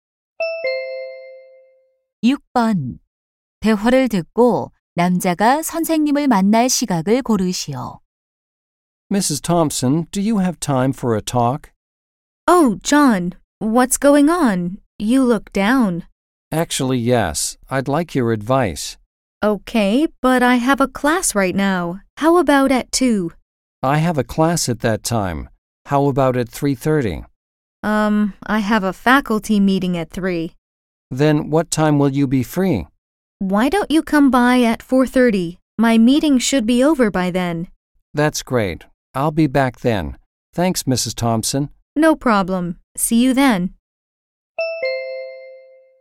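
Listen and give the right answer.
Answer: 4시 30분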